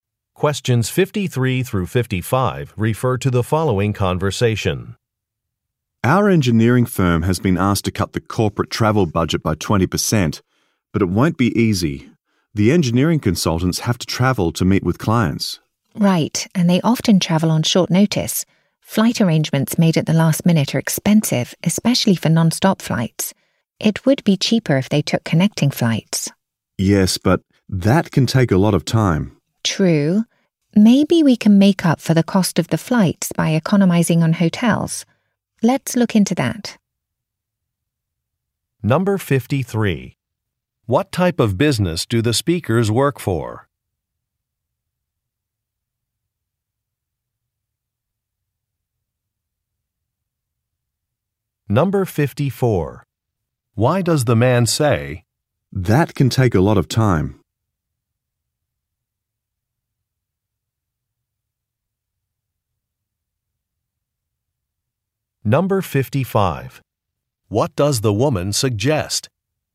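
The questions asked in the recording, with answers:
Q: What type of business do the speakers work for?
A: An engineering firm

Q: What does the woman suggest?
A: Saving money on hotels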